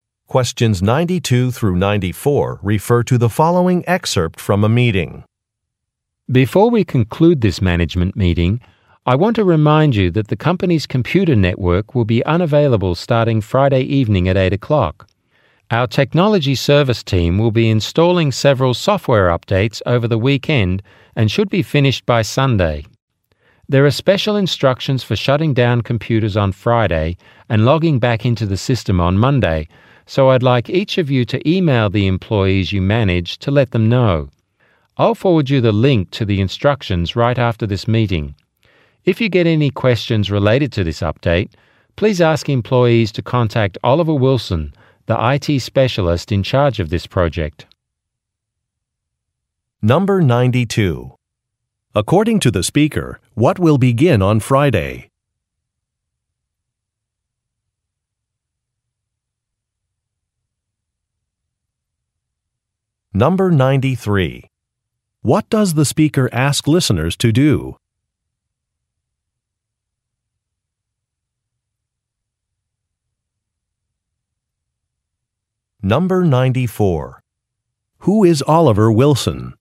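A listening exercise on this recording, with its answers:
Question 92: According to the speaker, what will begin on Friday?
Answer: A software update

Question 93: What does the speaker ask listeners to do?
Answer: Share instructions with their employees

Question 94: Who is Oliver Wilson?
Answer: A technology specialist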